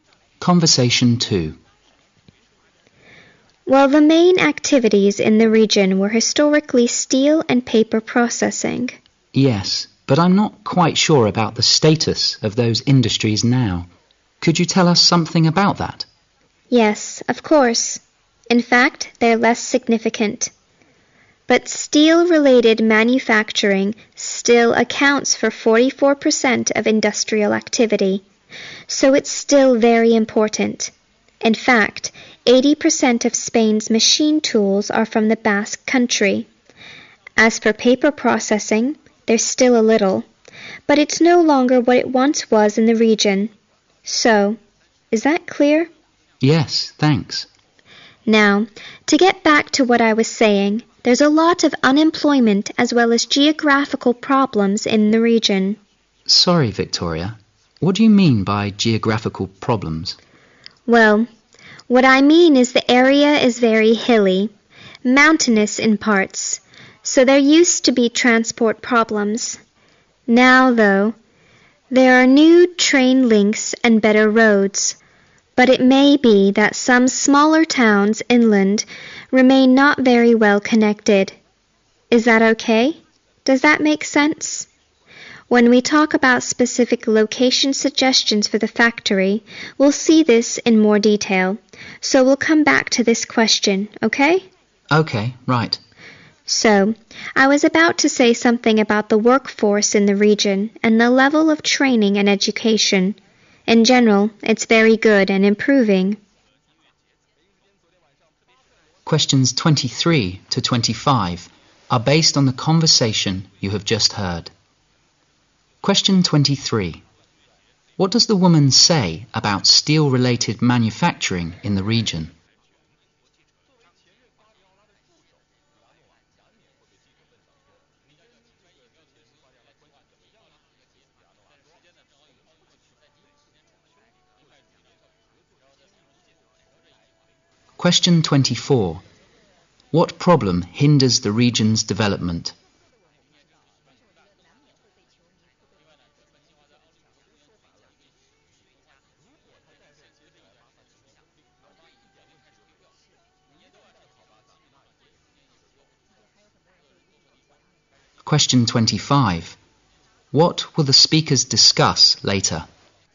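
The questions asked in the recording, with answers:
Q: What does the woman say about steel-related manufacturing in the region?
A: It is still very important (44% of industrial activity)

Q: What problem hinders the region's development?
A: Unemployment and geographical (transport) problems

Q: What will the speakers discuss later?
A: Specific location suggestions for the factory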